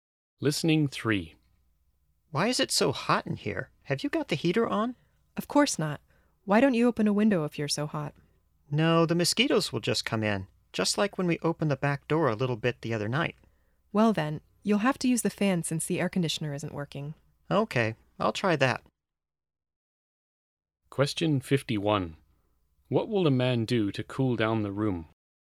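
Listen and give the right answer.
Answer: Use the fan.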